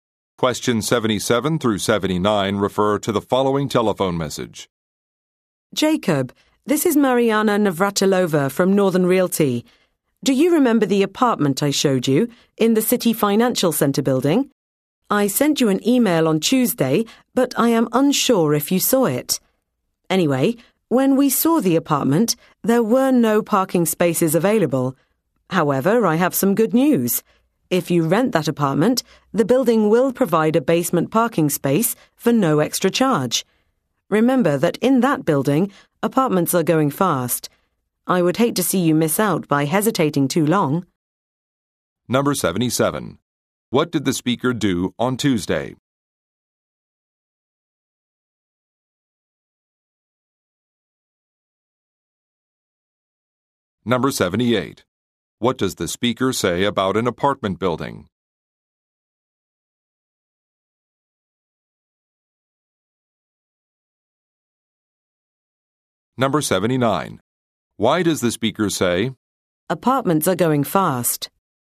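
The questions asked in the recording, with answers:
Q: What did the speaker do on Tuesday?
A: Sent an email

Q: What does the speaker say about an apartment building?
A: It will provide a free basement parking space

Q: Why does the speaker say, apartments are going fast?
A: To encourage Jacob to decide quickly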